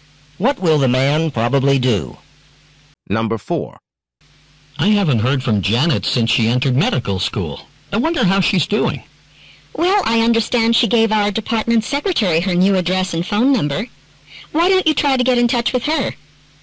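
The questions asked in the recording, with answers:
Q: What does the woman suggest the man do?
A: Get Janet's new address and phone number from the department secretary and contact her.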